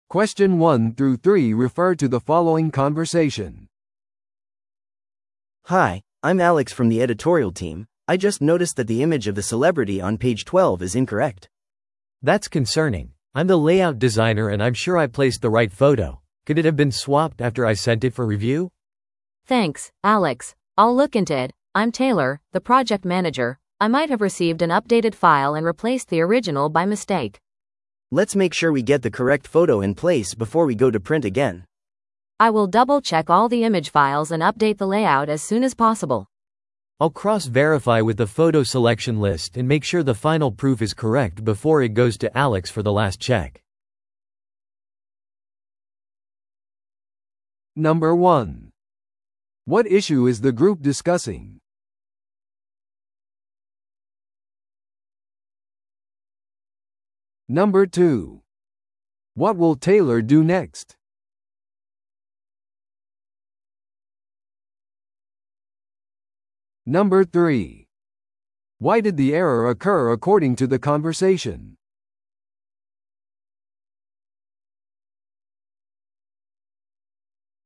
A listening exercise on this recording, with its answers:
Listen to the audio below and answer the questions.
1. What issue is the group discussing?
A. 雑誌のテキストのタイプミス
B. 雑誌のレイアウトでの写真の配置ミス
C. 未承認の画像が使用されている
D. 有名人の特集に対する不承認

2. What will Taylor do next?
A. 記事のテキストを調整する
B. 写真選定リストをレビューする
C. 画像ファイルをチェックして更新する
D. 有名人に謝罪する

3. Why did the error occur according to the conversation?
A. フォトエディターが間違ったファイルを使用した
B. アップデート中に誤って画像が置き換えられた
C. 雑誌が未完成の改訂で印刷された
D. チーム間のコミュニケーションが不足していた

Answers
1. B. 雑誌のレイアウトでの写真の配置ミス
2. C. 画像ファイルをチェックして更新する
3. B. アップデート中に誤って画像が置き換えられた

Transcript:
A: Hi, I'm Alex from the editorial team. I just noticed that the image of the celebrity on page 12 is incorrect.
B: That's concerning. I'm the layout designer and I'm sure I placed the right photo. Could it have been swapped after I sent it for review?
C: Thanks, Alex. I'll look into it. I'm Taylor, the project manager. I might have received an updated file and replaced the original by mistake.
A: Let's make sure we get the correct photo in place before we go to print again.
C: I will double-check all the image files and update the layout as soon as possible.
B: I'll cross-verify with the photo selection list and make sure the final proof is correct before it goes to Alex for the last check.

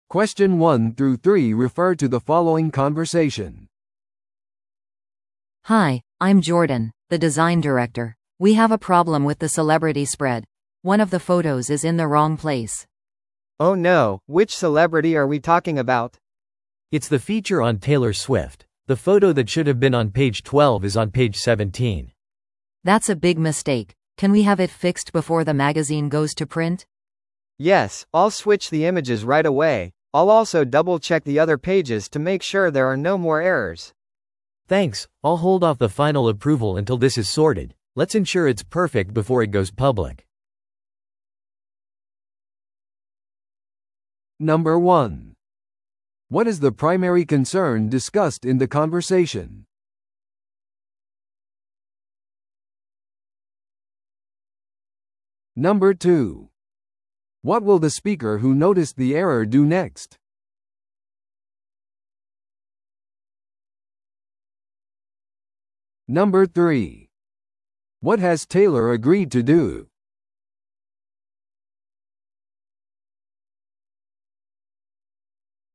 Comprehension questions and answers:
Listen to the audio below and answer the questions.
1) What is the primary concern discussed in the conversation?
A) セレブイベントに関する記事の出版。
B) セレブとの写真撮影を再スケジュールする。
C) 雑誌レイアウトのミスを修正する。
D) セレブインタビューの内容をレビューする。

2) What will the speaker who noticed the error do next?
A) セレブに声明を求めて連絡する。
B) 影響を受けたページの画像を入れ替える。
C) 雑誌のデジタル版を更新する。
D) そのまま雑誌を印刷に出す。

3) What has Taylor agreed to do?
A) プレゼント用の雑誌のサインをする。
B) 追加のインタビューに参加する。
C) 修正されたレイアウトを確認して承認する。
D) 雑誌の承認前に訂正を待つ。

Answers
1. C) 雑誌レイアウトのミスを修正する。
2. B) 影響を受けたページの画像を入れ替える。
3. D) 雑誌の承認前に訂正を待つ。

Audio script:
A: Hi, I'm Jordan, the design director. We have a problem with the celebrity spread; one of the photos is in the wrong place.
B: Oh no, which celebrity are we talking about?
C: It's the feature on Taylor Swift. The photo that should have been on page 12 is on page 17.
A: That's a big mistake. Can we have it fixed before the magazine goes to print?
B: Yes, I'll switch the images right away. I'll also double-check the other pages to make sure there are no more errors.
C: Thanks, I'll hold off the final approval until this is sorted. Let's ensure it's perfect before it goes public.

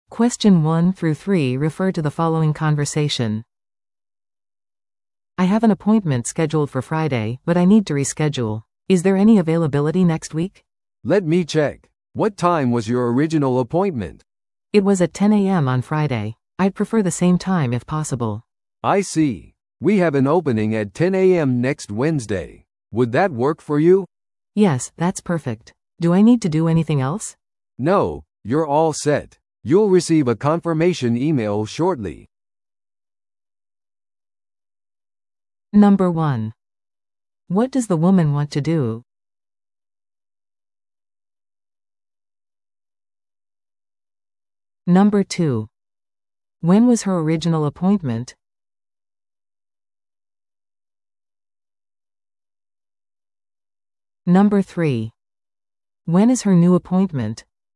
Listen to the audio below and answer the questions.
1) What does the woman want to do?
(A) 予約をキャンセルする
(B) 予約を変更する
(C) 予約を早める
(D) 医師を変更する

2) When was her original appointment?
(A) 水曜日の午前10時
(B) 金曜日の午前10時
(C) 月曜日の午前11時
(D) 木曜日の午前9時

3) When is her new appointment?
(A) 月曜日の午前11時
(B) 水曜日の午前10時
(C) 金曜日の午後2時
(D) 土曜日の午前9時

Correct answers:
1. (B) 予約を変更する
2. (B) 金曜日の午前10時
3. (B) 水曜日の午前10時

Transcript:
A: "I have an appointment scheduled for Friday, but I need to reschedule. Is there any availability next week?"
B: "Let me check. What time was your original appointment?"
A: "It was at 10 AM on Friday. I'd prefer the same time if possible."
B: "I see. We have an opening at 10 AM next Wednesday. Would that work for you?"
A: "Yes, that's perfect. Do I need to do anything else?"
B: "No, you're all set. You'll receive a confirmation email shortly."

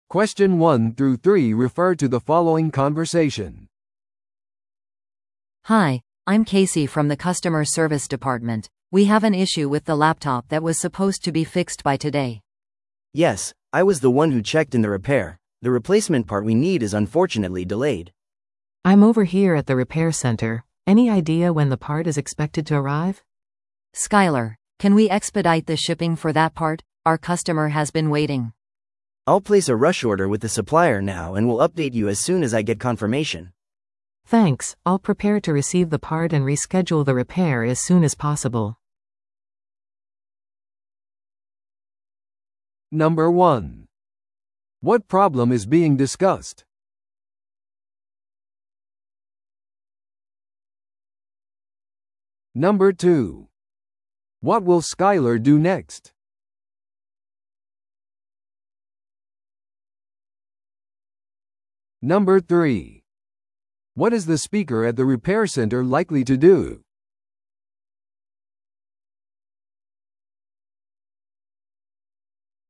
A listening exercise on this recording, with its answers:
Listen to the audio below and answer the questions.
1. What problem is being discussed?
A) 従業員のラップトップがなくなった。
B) カスタマーサービス部門が閉まっている。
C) ケイシーが修理技術者を探している。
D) ラップトップ修理の部品の遅れ。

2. What will Skyler do next?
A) お客様のために新しいラップトップを注文する。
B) 部品の急ぎの注文をサプライヤーに入れる。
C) ラップトップを修理するために修理センターに行く。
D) お詫びのためお客様に連絡する。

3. What is the speaker at the repair center likely to do?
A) お客様へのラップトップの配送を急ぐ。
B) 部品の到着についてのさらなる更新を待つ。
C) 部品が到着次第、修理のスケジュールを組む。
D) お客様に代替案を提供する。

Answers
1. D) ラップトップ修理の部品の遅れ。
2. B) 部品の急ぎの注文をサプライヤーに入れる。
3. C) 部品が到着次第、修理のスケジュールを組む。

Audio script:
A: Hi, I'm Casey from the customer service department. We have an issue with the laptop that was supposed to be fixed by today.
B: Yes, I was the one who checked in the repair. The replacement part we need is unfortunately delayed.
C: I'm over here at the repair center. Any idea when the part is expected to arrive?
A: Skyler, can we expedite the shipping for that part? Our customer has been waiting.
B: I'll place a rush order with the supplier now and will update you as soon as I get confirmation.
C: Thanks, I'll prepare to receive the part and reschedule the repair as soon as possible.

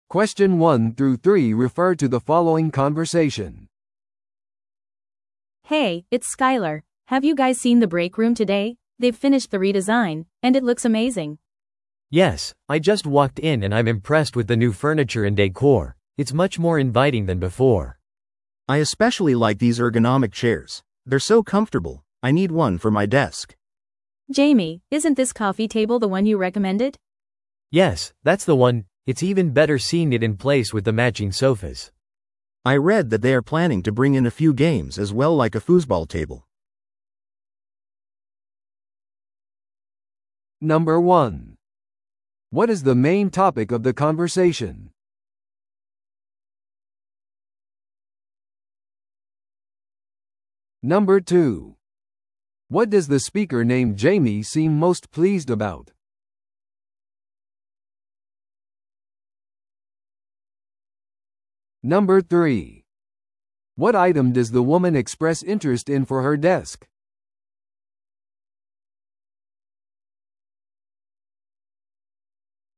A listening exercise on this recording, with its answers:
Listen to the audio below and answer the questions.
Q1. What is the main topic of the conversation?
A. オフィスの新しい家具を選ぶこと。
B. リニューアルされた休憩室の体験。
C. 人間工学に基づいた椅子の手配。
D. リデコレーションプロジェクトの組織化。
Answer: B. リニューアルされた休憩室の体験。

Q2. What does the speaker named Jamie seem most pleased about?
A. 人間工学に基づいた椅子が快適であること。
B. 休憩室に追加されるゲーム。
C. 彼が推薦したコーヒーテーブルが選ばれたこと。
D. リデザインが予定より早く完了したこと。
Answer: C. 彼が推薦したコーヒーテーブルが選ばれたこと。

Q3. What item does the woman express interest in for her desk?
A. 人間工学に基づいた椅子。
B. コーヒーテーブル。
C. ベビーフットのテーブル。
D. 合うソファ。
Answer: A. 人間工学に基づいた椅子。

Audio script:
Have you guys seen the break room today? They've finished the redesign, and it looks amazing!
B: Yes, I just walked in and I'm impressed with the new furniture and decor. It's much more inviting than before.
C: I especially like these ergonomic chairs. They're so comfortable! I need one for my desk.
A: Jamie, isn't this coffee table the one you recommended?
B: Yes, that's the one! It's even better seeing it in place with the matching sofas.
C: I read that they are planning to bring in a few games as well– like a foosball table.

